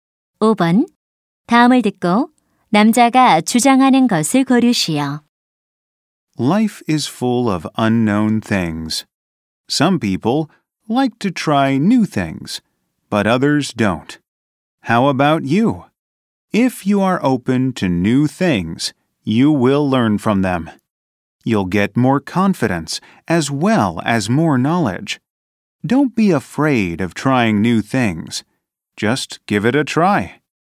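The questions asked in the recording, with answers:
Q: 다음을 듣고 남자가 주장하는 것을 고르시오.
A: 새로운 것을 시도하는 것을 두려워하지 말라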